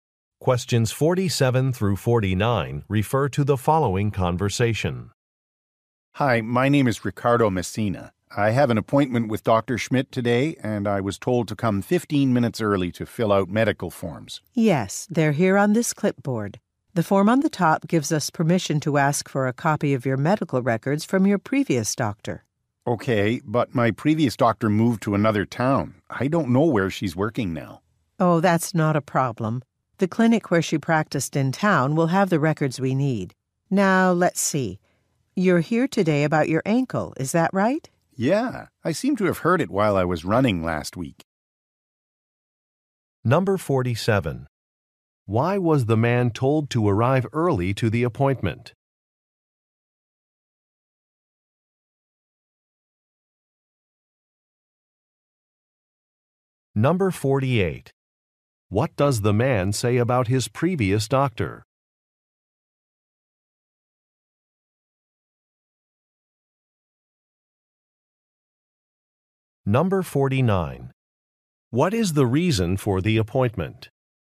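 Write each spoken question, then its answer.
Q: Why was the man told to arrive early to the appointment?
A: To fill out medical forms

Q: What does the man say about his previous doctor?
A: She moved to another town

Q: What is the reason for the appointment?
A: He hurt his ankle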